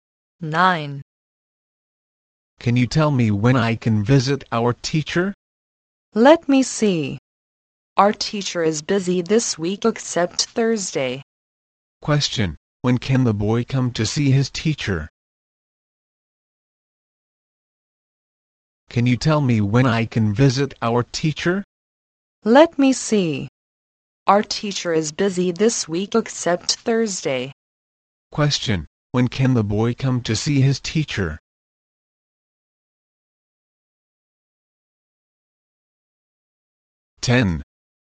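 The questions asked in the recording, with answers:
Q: Question, when can the boy come to see his teacher?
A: On Thursday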